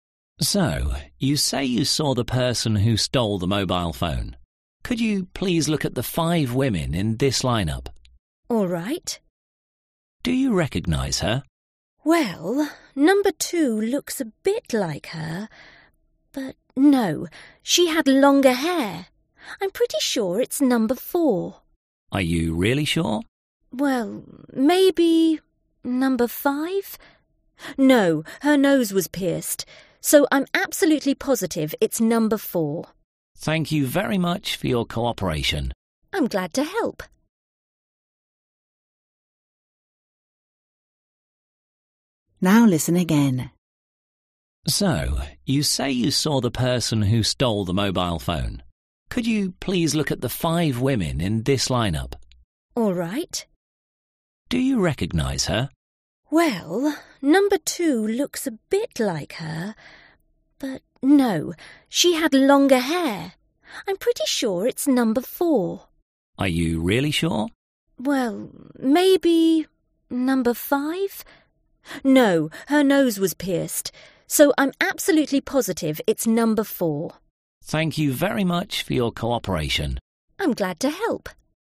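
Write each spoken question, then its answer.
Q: Who is the suspect?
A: Woman number 4 in the lineup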